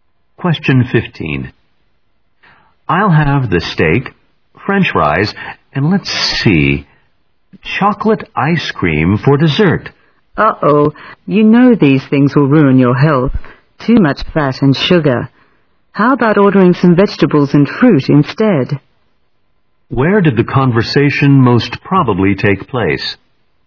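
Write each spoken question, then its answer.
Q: Where did the conversation most probably take place?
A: In a restaurant.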